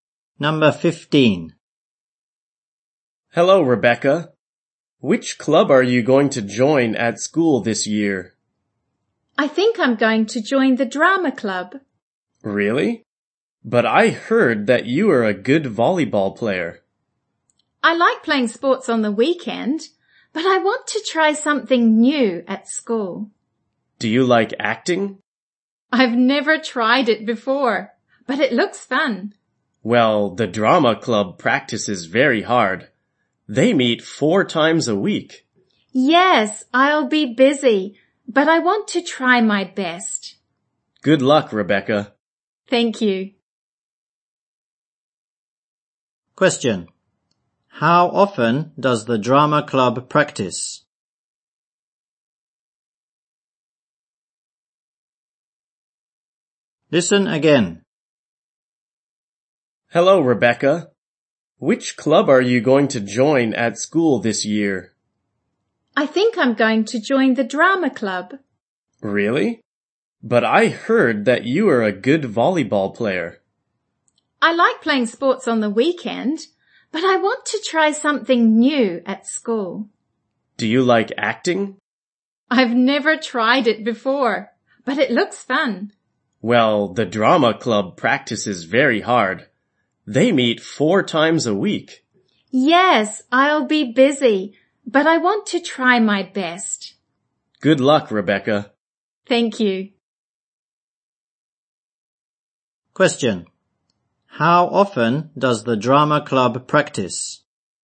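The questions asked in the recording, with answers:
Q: How often does the drama club practice?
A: Four times a week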